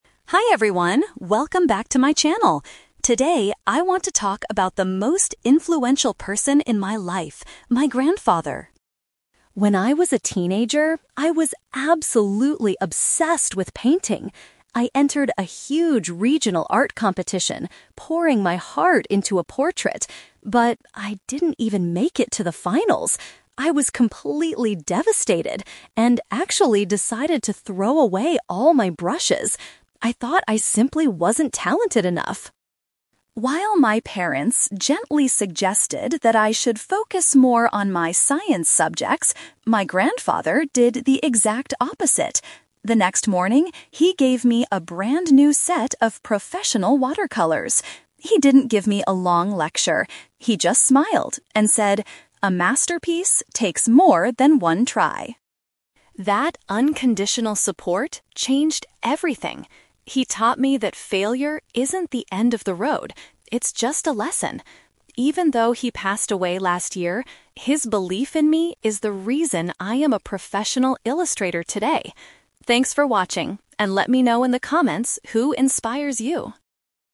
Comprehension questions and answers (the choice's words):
Listen to a vlogger talking about a family member. Choose the best answer (A, B, or C) for each question.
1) What caused the speaker to almost quit her hobby?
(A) She did not win an important art contest.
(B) Her parents forced her to study science instead.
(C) She lost all of her expensive painting tools.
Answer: She did not win an important art contest.

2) How did the grandfather show his support?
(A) By giving her a long, encouraging speech.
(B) By purchasing new painting materials for her.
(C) By helping her draw a beautiful masterpiece.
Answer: By purchasing new painting materials for her.

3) What is the main lesson the vlogger learned from her grandfather?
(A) Family members should always buy gifts for each other.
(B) Making mistakes is a necessary part of achieving success.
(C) Science subjects are much less important than art.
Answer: Making mistakes is a necessary part of achieving success.

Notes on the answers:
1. The vlogger says she entered a "huge regional art competition" but "didn't even make it to the finals," which made her want to throw away her brushes. Paraphrasing: didn't make it to the finals = did not win; competition = contest.
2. The grandfather gave her "a brand-new set of professional watercolors." Paraphrasing: watercolors = painting materials; gave a brand-new set = purchasing new materials.
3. The grandfather taught her that "failure isn't the end of the road; it's just a lesson." This means failing (making mistakes) helps you learn and succeed later.

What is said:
Vlogger: Hi everyone, welcome back to my channel! Today, I want to talk about the most influential person in my life: my grandfather.
When I was a teenager, I was absolutely obsessed with painting. I entered a huge regional art competition, pouring my heart into a portrait. But... I didn't even make it to the finals. I was completely devastated and actually decided to throw away all my brushes. I thought I simply wasn't talented enough.
While my parents gently suggested that I should focus more on my science subjects, my grandfather did the exact opposite. The next morning, he gave me a brand-new set of professional watercolors. He didn't give me a long lecture. He just smiled and said, "A masterpiece takes more than one try."
That unconditional support changed everything. He taught me that failure isn't the end of the road; it's just a lesson. Even though he passed away last year, his belief in me is the reason I am a professional illustrator today. Thanks for watching, and let me know in the comments who inspires you!